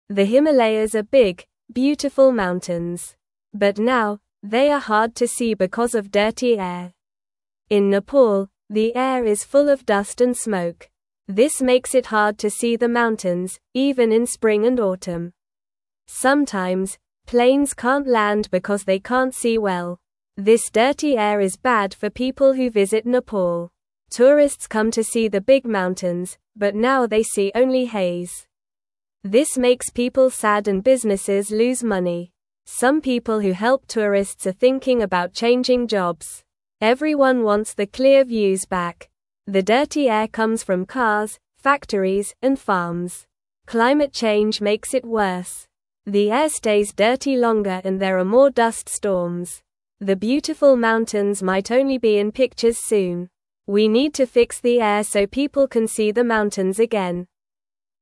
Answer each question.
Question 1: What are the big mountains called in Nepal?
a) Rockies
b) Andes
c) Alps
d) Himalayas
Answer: d

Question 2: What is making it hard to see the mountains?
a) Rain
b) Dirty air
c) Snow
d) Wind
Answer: b

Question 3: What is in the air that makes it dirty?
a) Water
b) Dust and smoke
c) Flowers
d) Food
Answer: b

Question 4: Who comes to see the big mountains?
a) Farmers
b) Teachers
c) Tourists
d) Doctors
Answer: c

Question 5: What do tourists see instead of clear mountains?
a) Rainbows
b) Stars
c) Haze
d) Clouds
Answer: c

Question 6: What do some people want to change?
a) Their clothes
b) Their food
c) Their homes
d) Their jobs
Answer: d

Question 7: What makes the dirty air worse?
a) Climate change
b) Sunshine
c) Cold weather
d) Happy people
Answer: a

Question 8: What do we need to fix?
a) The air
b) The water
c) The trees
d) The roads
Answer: a

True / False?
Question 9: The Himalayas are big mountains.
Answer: True

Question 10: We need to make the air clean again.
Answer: True

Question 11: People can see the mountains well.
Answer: False

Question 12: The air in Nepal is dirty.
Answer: True

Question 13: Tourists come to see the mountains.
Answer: True

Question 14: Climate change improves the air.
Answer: False

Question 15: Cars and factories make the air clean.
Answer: False

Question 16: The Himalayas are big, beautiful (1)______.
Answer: mountains

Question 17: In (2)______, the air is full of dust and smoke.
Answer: Nepal

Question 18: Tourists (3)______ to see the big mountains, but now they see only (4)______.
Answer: come

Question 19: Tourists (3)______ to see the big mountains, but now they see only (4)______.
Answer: haze

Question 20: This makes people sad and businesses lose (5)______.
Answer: money

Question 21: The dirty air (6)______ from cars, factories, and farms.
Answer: comes

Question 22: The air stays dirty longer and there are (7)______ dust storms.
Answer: more

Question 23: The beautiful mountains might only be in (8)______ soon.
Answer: pictures

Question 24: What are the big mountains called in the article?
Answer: The big mountains are called the Himalayas.

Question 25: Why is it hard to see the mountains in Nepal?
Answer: the air is dirty with dust and smoke

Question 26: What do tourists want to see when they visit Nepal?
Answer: Tourists want to see the big mountains.

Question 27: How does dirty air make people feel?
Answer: Dirty air makes people feel sad.

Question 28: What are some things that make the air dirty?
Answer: Cars, factories, and farms make the air dirty.

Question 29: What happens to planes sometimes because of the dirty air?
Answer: Sometimes, planes can't land because they can't see well.

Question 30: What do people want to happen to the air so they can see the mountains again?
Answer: People want the air to be clean

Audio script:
The Himalayas are big, beautiful mountains. But now, they are hard to see because of dirty air. In Nepal, the air is full of dust and smoke. This makes it hard to see the mountains, even in spring and autumn. Sometimes, planes can't land because they can't see well.
This dirty air is bad for people who visit Nepal. Tourists come to see the big mountains, but now they see only haze. This makes people sad and businesses lose money. Some people who help tourists are thinking about changing jobs. Everyone wants the clear views back.
The dirty air comes from cars, factories, and farms. Climate change makes it worse. The air stays dirty longer and there are more dust storms. The beautiful mountains might only be in pictures soon. We need to fix the air so people can see the mountains again.

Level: Level 1

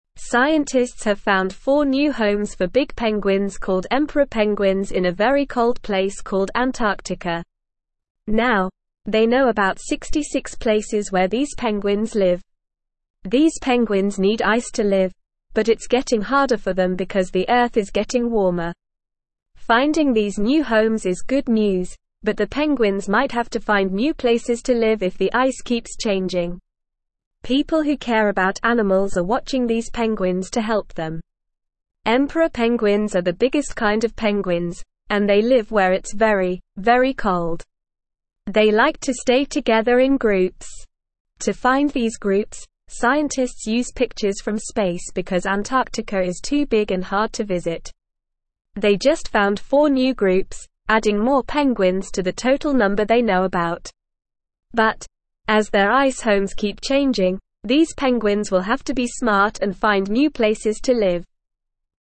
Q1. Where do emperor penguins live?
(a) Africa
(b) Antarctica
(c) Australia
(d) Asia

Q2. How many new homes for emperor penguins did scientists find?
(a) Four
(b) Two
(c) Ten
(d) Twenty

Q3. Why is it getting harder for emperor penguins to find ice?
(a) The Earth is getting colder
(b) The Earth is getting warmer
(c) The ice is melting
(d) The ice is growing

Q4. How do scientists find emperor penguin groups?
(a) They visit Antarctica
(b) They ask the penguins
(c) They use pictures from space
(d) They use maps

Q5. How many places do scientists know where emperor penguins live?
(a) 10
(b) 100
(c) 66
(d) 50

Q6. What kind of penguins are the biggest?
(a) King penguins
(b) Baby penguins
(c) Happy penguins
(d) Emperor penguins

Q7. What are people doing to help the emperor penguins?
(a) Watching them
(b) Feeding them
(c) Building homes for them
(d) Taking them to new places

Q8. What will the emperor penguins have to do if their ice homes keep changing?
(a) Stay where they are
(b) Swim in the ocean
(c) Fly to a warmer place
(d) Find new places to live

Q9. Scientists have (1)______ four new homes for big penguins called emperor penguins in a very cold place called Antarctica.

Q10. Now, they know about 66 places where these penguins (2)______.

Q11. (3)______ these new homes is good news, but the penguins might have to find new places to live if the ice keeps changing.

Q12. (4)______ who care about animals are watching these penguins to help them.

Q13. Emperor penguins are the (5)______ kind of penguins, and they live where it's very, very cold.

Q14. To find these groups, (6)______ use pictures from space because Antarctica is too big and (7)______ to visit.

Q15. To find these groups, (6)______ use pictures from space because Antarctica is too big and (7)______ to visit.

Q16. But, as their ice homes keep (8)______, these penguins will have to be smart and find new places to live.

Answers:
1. b
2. a
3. b
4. c
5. c
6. d
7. a
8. d
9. found
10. live
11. Finding
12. People
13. biggest
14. scientists
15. hard
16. changing

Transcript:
Scientists have found four new homes for big penguins called emperor penguins in a very cold place called Antarctica. Now, they know about 66 places where these penguins live. These penguins need ice to live, but it's getting harder for them because the Earth is getting warmer. Finding these new homes is good news, but the penguins might have to find new places to live if the ice keeps changing. People who care about animals are watching these penguins to help them.
Emperor penguins are the biggest kind of penguins, and they live where it's very, very cold. They like to stay together in groups. To find these groups, scientists use pictures from space because Antarctica is too big and hard to visit. They just found four new groups, adding more penguins to the total number they know about. But, as their ice homes keep changing, these penguins will have to be smart and find new places to live.

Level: Level 1

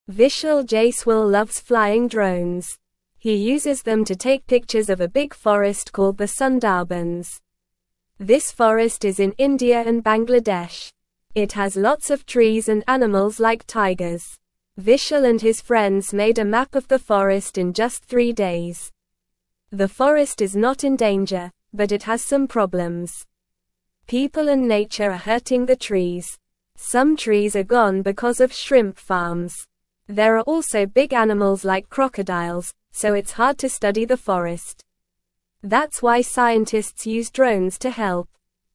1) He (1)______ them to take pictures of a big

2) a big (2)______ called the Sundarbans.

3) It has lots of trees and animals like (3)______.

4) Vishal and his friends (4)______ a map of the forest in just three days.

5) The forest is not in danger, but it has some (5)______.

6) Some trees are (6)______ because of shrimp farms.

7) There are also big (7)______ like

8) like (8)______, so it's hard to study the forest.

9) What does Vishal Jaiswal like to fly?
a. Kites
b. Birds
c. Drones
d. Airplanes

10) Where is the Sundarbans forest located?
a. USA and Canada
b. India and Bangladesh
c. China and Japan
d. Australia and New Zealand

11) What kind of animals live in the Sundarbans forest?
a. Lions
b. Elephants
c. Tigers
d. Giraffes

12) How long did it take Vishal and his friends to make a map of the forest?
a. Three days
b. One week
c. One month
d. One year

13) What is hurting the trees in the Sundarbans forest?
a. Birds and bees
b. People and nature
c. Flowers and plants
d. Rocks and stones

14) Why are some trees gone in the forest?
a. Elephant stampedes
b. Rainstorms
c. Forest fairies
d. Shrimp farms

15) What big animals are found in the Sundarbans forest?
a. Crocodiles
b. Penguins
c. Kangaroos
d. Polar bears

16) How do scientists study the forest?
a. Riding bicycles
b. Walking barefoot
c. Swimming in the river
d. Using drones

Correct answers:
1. uses
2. forest
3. tigers
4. made
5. problems
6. gone
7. animals
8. crocodiles
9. c
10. b
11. c
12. a
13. b
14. d
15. a
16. d

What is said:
Vishal Jaiswal loves flying drones. He uses them to take pictures of a big forest called the Sundarbans. This forest is in India and Bangladesh. It has lots of trees and animals like tigers. Vishal and his friends made a map of the forest in just three days.
The forest is not in danger, but it has some problems. People and nature are hurting the trees. Some trees are gone because of shrimp farms. There are also big animals like crocodiles, so it's hard to study the forest. That's why scientists use drones to help.

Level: Level 1

